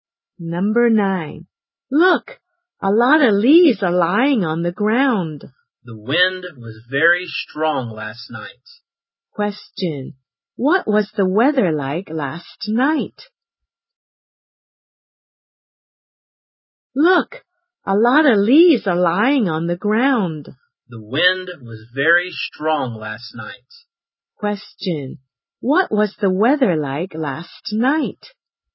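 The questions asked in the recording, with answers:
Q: What was the weather like last night?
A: Windy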